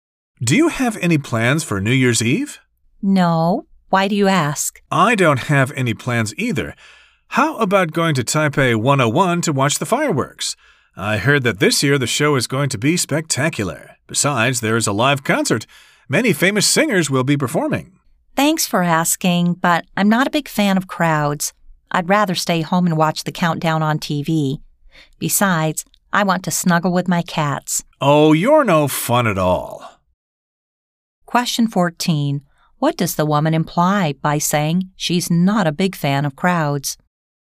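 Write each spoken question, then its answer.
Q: What does the woman imply by saying she's not a big fan of crowds?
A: She doesn't want to go to Taipei 101 to watch the fireworks.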